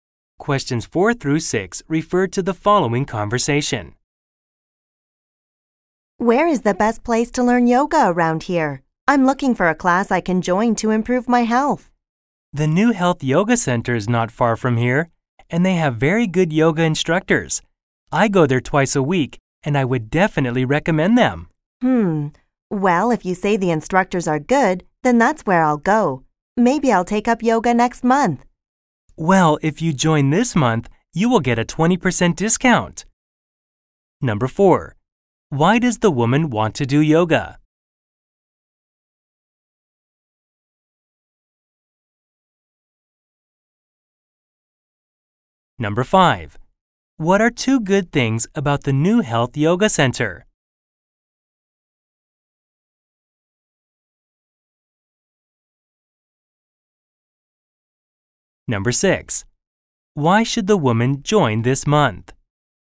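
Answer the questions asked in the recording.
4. To improve her health
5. It is not far away and has very good instructors
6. She will get a 20% discount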